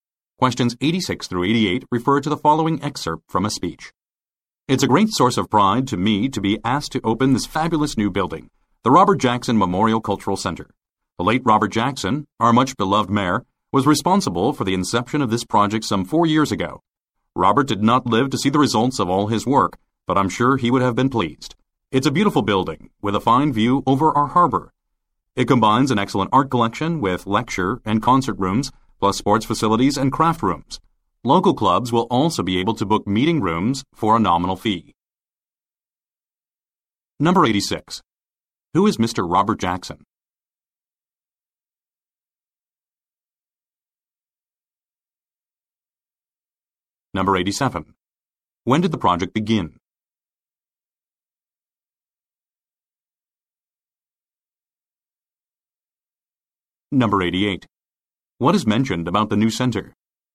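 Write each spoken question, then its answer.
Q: Who is Mr. Robert Jackson?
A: The late mayor

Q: When did the project begin?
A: About 4 years ago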